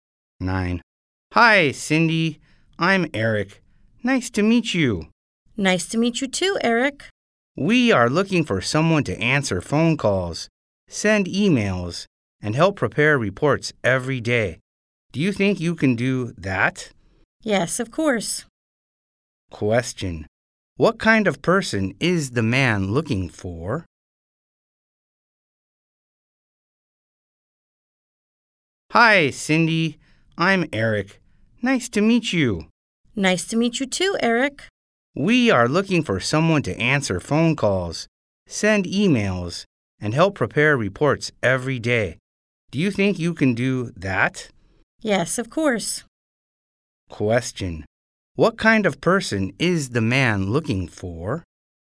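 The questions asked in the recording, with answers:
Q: What kind of person is the man looking for?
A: An assistant or secretary who answers phone calls, sends emails and helps prepare reports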